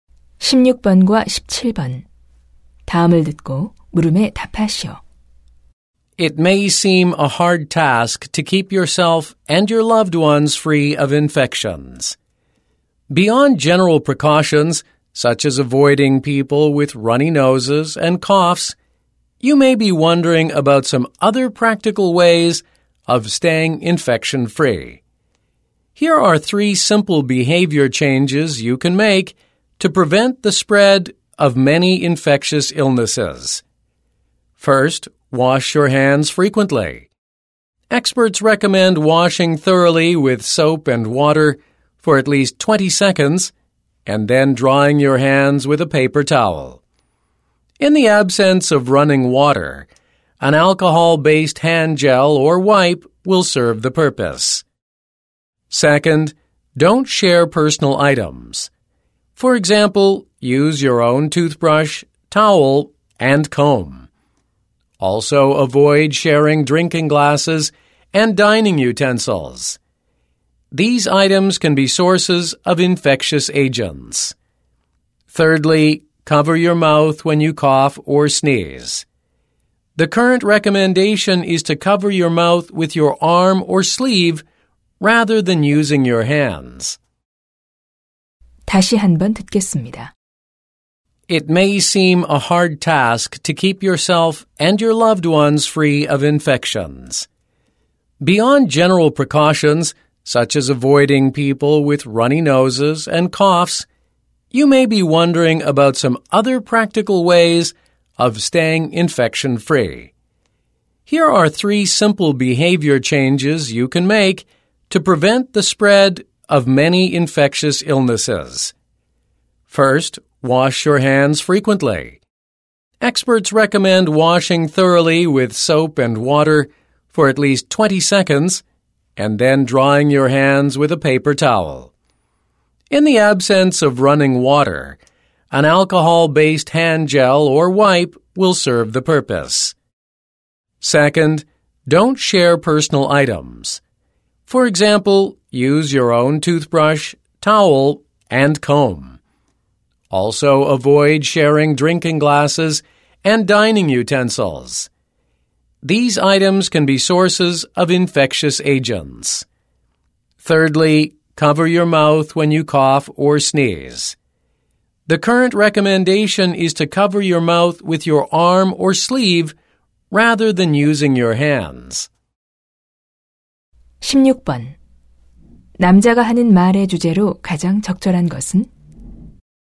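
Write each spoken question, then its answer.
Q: 남자가 하는 말의 주제로 가장 적절한 것은?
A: 감염을 예방하는 간단한 행동 수칙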